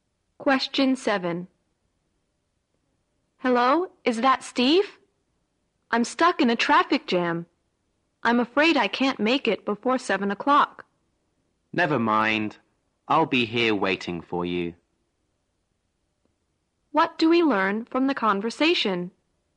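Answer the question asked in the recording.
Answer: The speaker is stuck in traffic and will be late, and Steve will wait for them.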